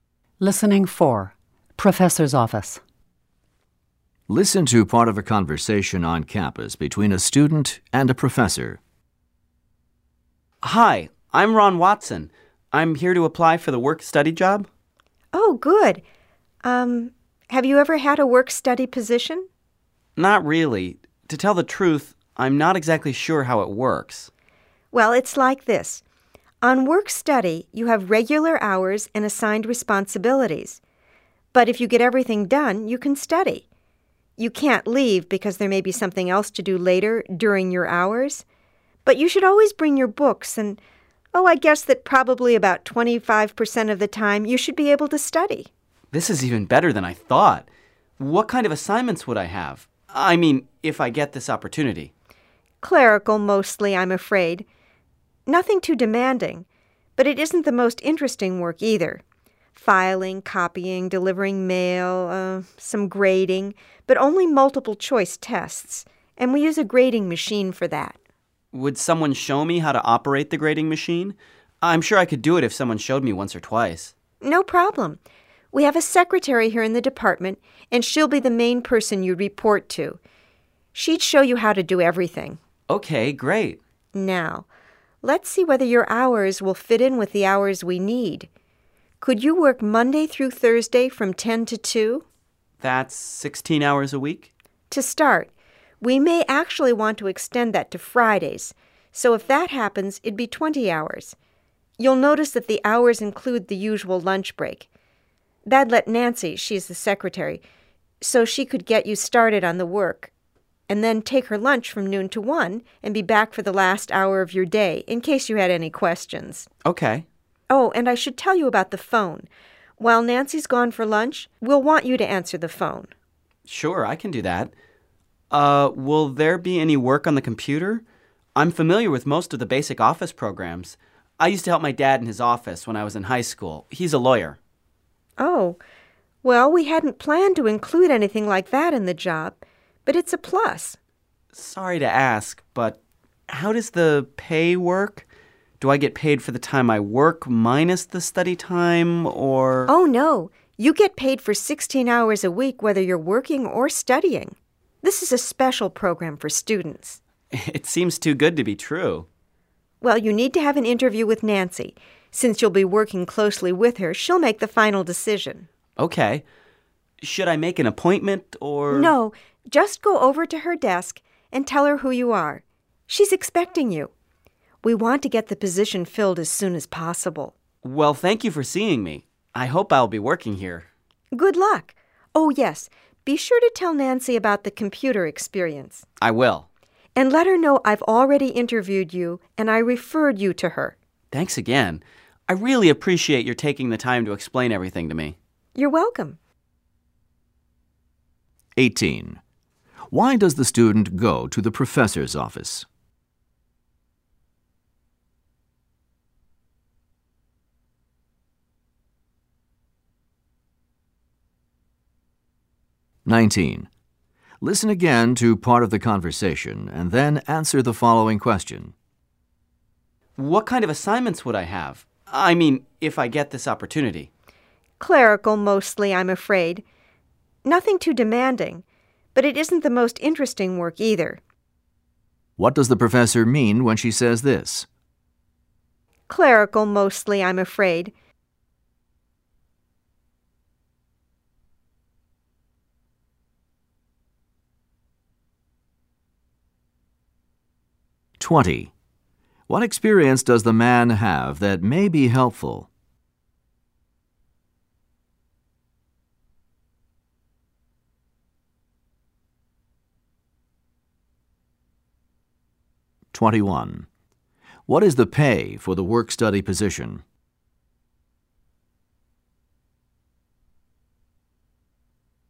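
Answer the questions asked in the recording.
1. Computer experience with basic office programs from helping in his father's office
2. Pay for 16 hours a week, whether working or studying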